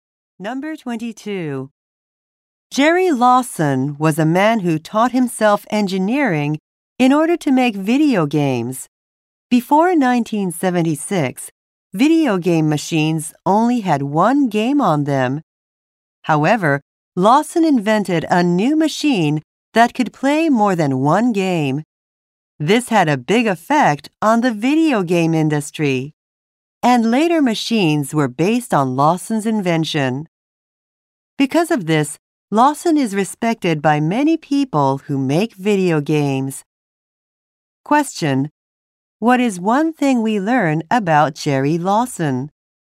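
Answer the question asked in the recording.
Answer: He invented a machine that could play more than one game.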